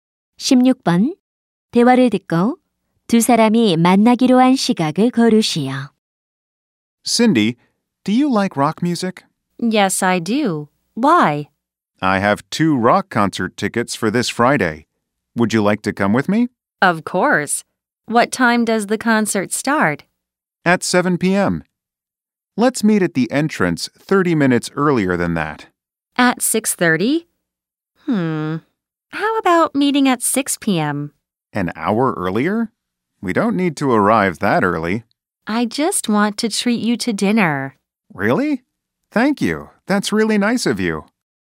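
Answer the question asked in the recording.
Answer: 오후 6시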